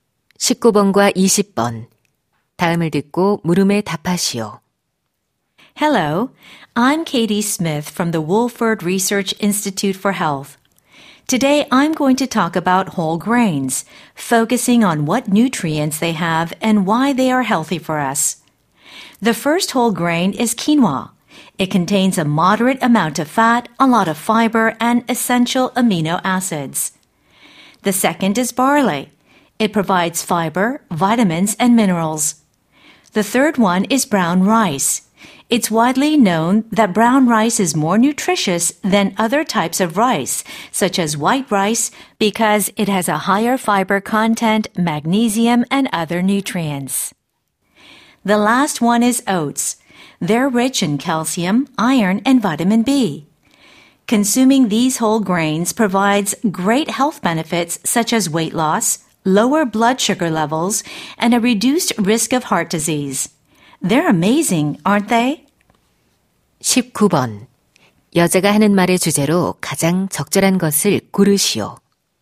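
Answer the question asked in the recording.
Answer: 통곡물의 영양소와 건강상의 이점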